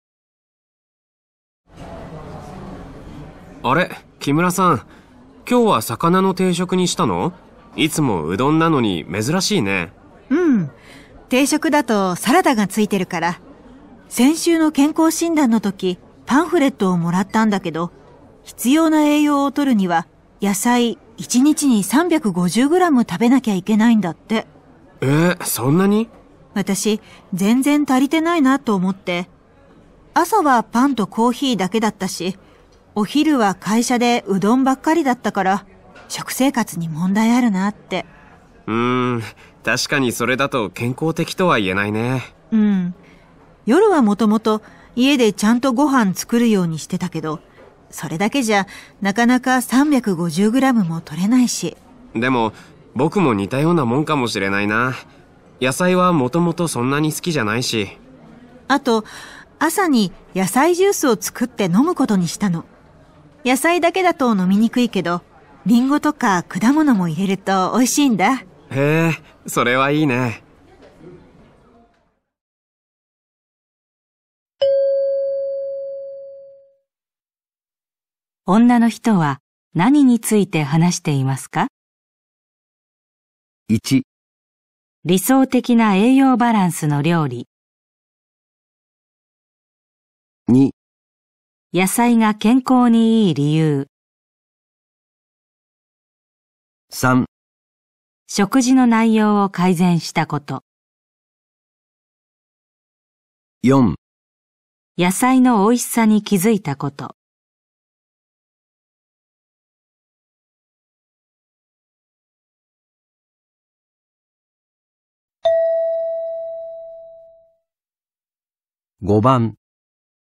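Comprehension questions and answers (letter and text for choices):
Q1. 女の人は何について話していますか。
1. 理想的な栄養バランスの料理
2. 野菜が健康に良い理由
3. 食事の内容を改善したこと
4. 野菜のおいしさに気づいたこと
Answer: 3. 食事の内容を改善したこと

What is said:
男:あれ?木村さん。今日は魚の定食にしたの?いつもうどんなのに珍しいね。
女:うん。定食だとサラダがついてるから。先週の健康診断の時パンフレットをもらったんだ けど必要な栄養を取るには野菜1日に350グラム食べなきゃいけないんだって。
男:そんなに?
女:私、全然足りてないなと思って。朝はパンとコーヒーだけだったし、お昼は会社でうどん ばっかりだったから、食生活に問題あるなって。
男:んー、確かにそれだと健康的とは言えないね。
女:うん。夜はもともと家でちゃんとご飯作るようにしてたけど、それだけじゃなかなか350 グラムも取れないし。
男:でも僕も似たようなもんかもしれないなぁ。野菜はもともとそんなに好きじゃないし。
女:あと朝に野菜ジュースを作って飲むことにしたの。野菜だけだと飲みにくいけど、りんご とか果物も入れるとおいしいんだ。
男:へぇー、それはいいね。

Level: N2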